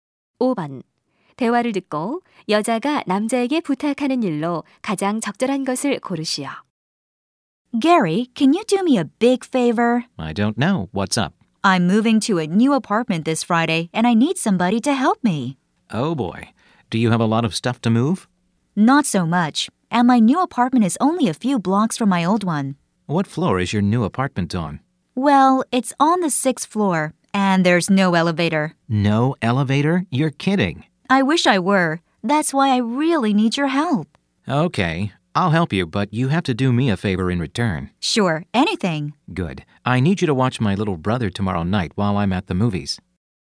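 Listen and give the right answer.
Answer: 이사 도와주기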